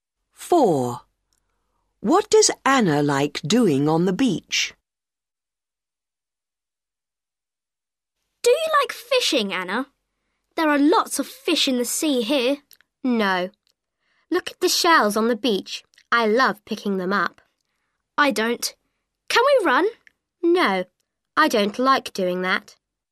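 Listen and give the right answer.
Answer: Picking up shells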